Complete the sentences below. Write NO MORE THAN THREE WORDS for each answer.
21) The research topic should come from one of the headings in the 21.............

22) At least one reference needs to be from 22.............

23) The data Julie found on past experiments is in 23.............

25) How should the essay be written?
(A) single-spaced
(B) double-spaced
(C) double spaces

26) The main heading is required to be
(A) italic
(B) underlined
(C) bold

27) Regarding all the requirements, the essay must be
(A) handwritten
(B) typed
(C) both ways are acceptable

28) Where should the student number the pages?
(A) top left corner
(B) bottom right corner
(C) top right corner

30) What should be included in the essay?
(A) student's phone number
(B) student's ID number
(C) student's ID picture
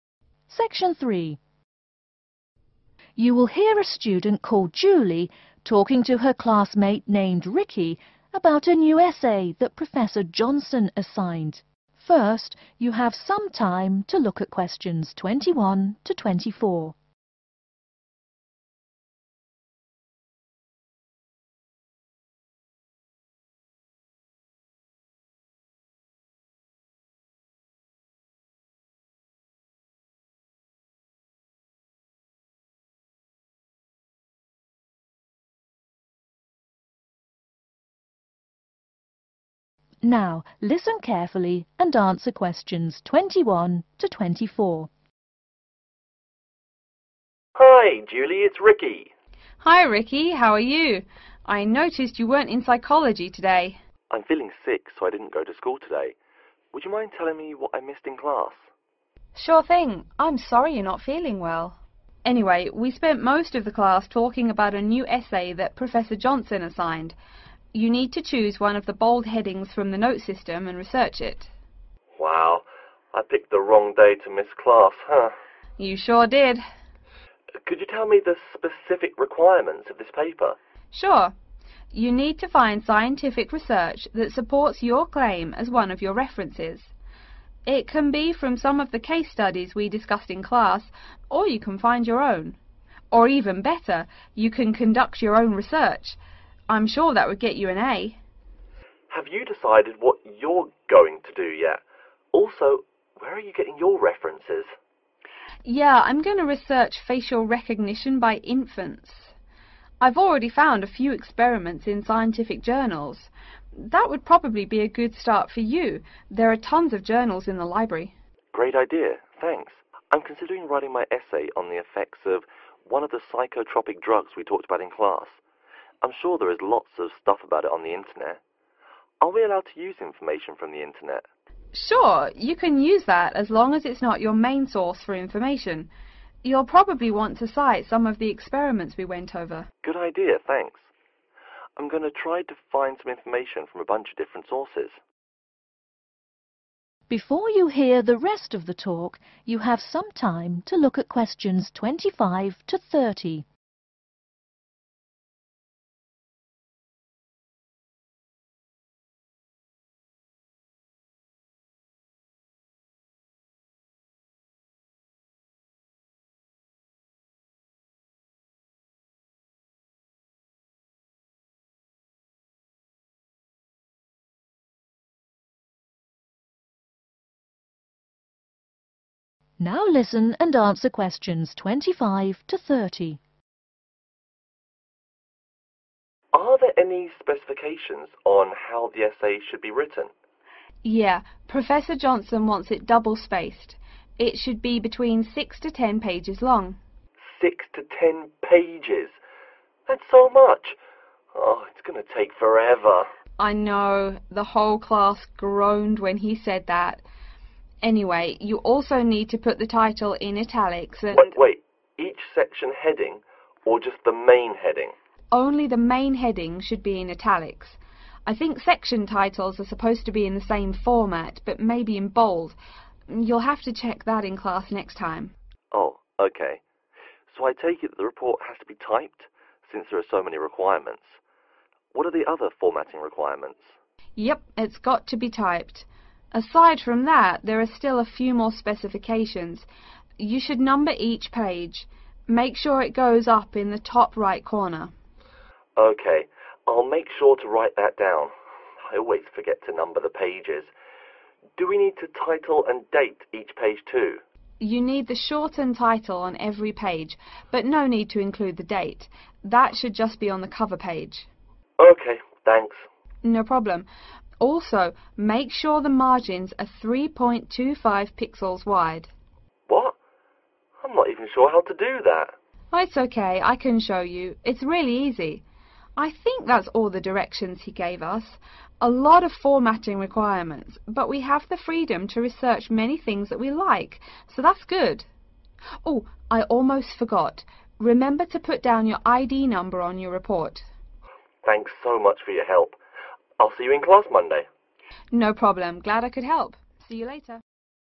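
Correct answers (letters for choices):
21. note system
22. scientific research
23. scientific journals
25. B
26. A
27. B
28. C
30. B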